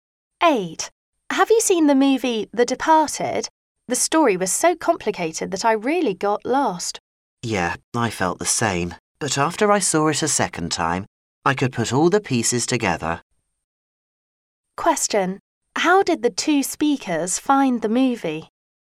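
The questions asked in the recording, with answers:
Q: How did the two speakers find the movie?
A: Hard to follow at first because the story was complicated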